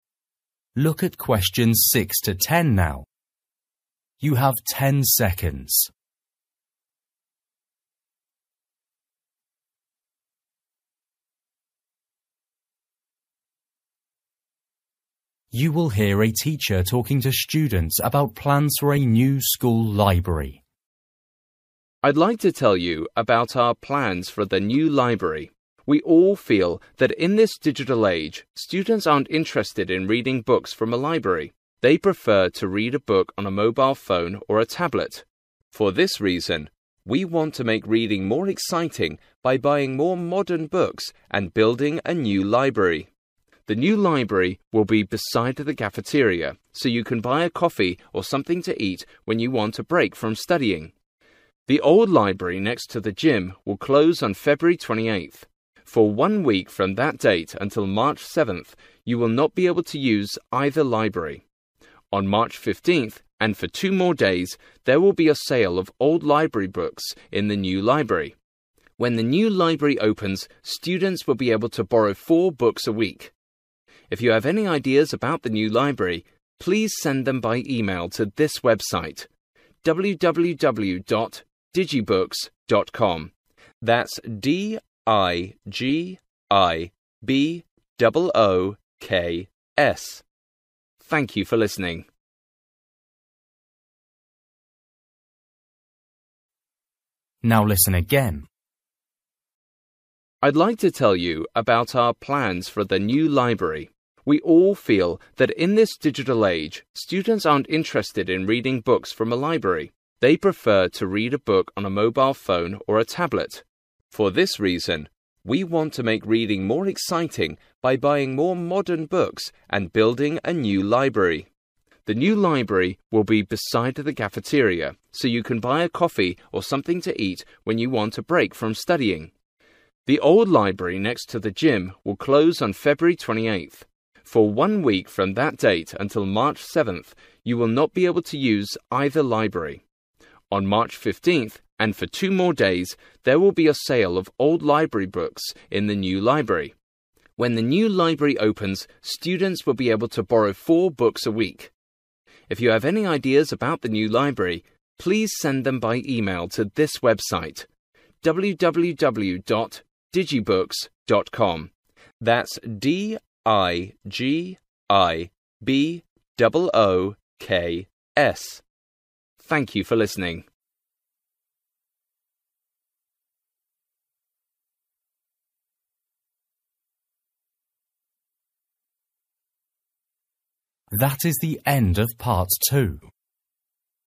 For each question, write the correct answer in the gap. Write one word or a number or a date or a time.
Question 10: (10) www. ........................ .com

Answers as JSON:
{"10": "digibooks"}

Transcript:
Man: I'd like to tell you about our plans for the new library. We all feel that in this digital age students aren't interested in reading books from a library. They prefer to read a book on a mobile phone or a tablet. For this reason, we want to make reading more exciting by buying more modern books and building a new library.
(6) The new library will be beside the cafeteria, so you can buy a coffee or something to eat when you want a break from studying. The old library, next to the gym, will close on February 28th.
(7) For one week from that date, until March 7th, you will not be able to use either library. (8) On March 15th, and for two more days, there will be a sale of old library books in the new library.
(9) When the new library opens, students will be able to borrow four books a week. If you have any ideas about the new library, please send them by email to (10) this website: www-dot-digibooks-dot-com. That's D-I-G-I-B-double O-K-S. Thank you for listening.

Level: KET (A2)